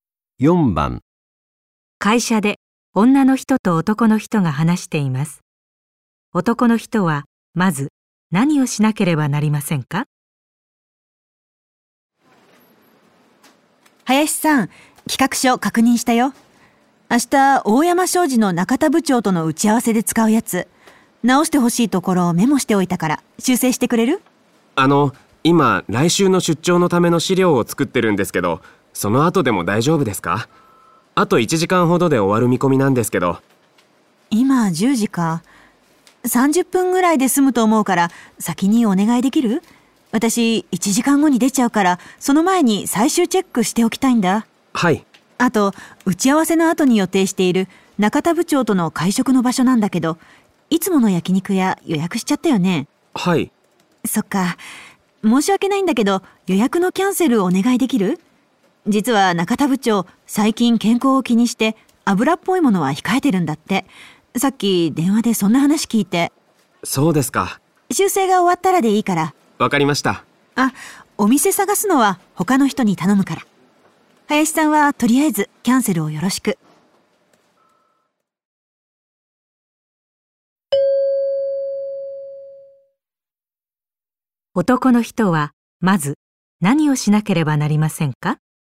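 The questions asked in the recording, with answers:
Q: 男の人はまず何をしなければなりませんか?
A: 企画書を修正する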